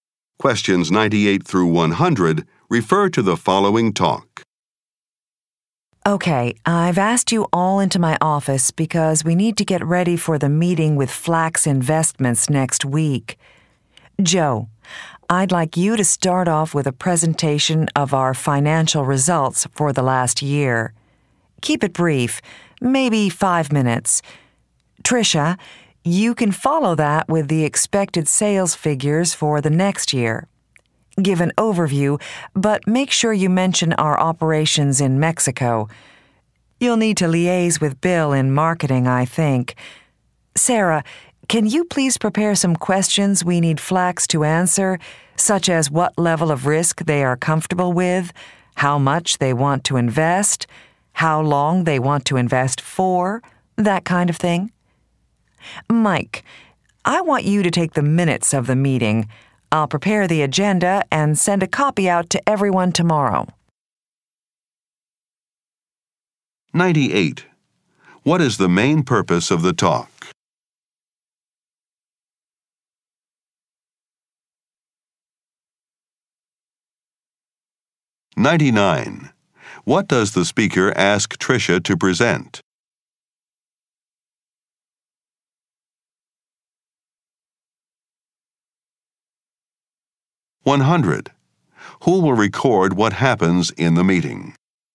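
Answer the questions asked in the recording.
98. To prepare for next week's meeting with Flax Investments
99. Expected sales figures for next year
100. Mike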